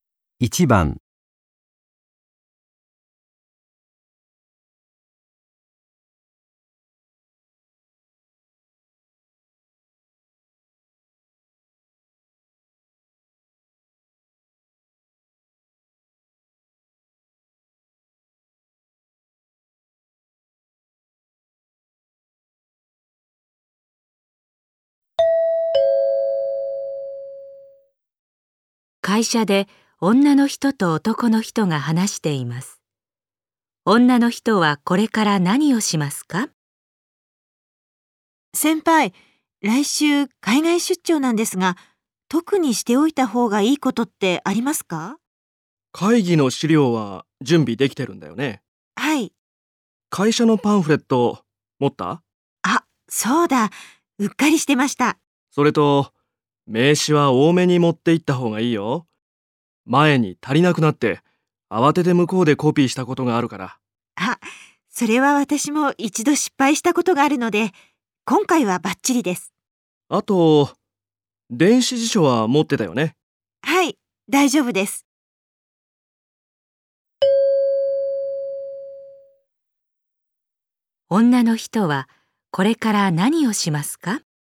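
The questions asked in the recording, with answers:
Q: 女の人はこれから何をしますか?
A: 会社のパンフレットを準備する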